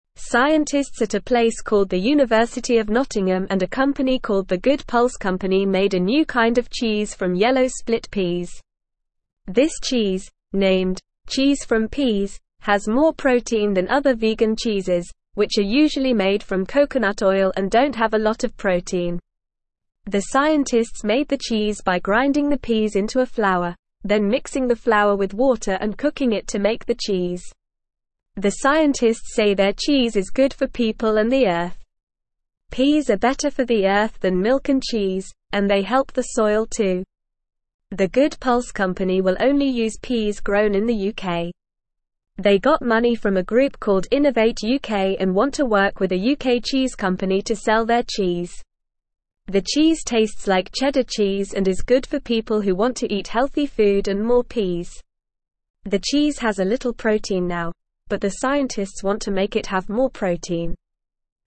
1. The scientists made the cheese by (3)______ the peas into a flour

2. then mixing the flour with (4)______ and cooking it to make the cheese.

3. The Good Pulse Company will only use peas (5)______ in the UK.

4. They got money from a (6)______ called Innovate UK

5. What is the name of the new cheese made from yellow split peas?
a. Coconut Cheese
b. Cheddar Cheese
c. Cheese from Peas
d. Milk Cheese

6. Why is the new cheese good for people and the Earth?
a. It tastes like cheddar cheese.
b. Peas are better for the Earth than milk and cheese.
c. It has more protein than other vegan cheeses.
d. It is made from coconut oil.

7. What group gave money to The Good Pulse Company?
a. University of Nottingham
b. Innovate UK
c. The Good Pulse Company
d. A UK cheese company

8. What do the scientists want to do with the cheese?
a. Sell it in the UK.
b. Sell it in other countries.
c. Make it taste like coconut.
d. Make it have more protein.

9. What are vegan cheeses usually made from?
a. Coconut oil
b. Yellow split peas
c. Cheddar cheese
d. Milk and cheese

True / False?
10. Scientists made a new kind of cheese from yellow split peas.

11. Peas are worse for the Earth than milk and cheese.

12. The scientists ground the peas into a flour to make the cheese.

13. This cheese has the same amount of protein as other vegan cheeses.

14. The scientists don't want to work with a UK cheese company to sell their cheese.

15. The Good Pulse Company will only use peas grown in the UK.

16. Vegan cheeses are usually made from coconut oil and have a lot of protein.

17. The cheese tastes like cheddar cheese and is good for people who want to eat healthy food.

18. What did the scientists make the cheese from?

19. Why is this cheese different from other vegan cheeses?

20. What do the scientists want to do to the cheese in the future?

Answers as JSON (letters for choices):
{"1": "grinding", "2": "water", "3": "grown", "4": "group", "5": "c", "6": "b", "7": "b", "8": "d", "9": "a", "10": "True", "11": "False", "12": "True", "13": "False", "14": "False", "15": "True", "16": "False", "17": "True", "18": "The scientists made the cheese from yellow split peas.", "19": "This cheese is different because it has more protein than other vegan cheeses.", "20": "The scientists want to make the cheese have more protein in the future."}

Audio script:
Scientists at a place called the University of Nottingham and a company called The Good Pulse Company made a new kind of cheese from yellow split peas. This cheese, named "Cheese from Peas," has more protein than other vegan cheeses, which are usually made from coconut oil and don't have a lot of protein. The scientists made the cheese by grinding the peas into a flour, then mixing the flour with water and cooking it to make the cheese.
The scientists say their cheese is good for people and the Earth. Peas are better for the Earth than milk and cheese, and they help the soil too. They got money from a group called Innovate UK and want to work with a UK cheese company to sell their cheese. The cheese tastes like cheddar cheese and is good for people who want to eat healthy food and more peas. The cheese has a little protein now, but the scientists want to make it have more protein.

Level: Level 1